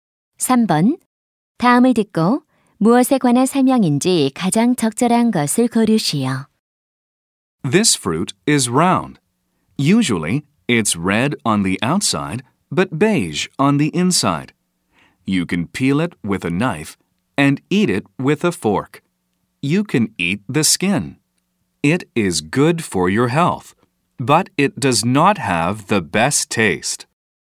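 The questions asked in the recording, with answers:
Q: 다음을 듣고 무엇에 관한 설명인지 가장 적절한 것을 고르시오.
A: 사과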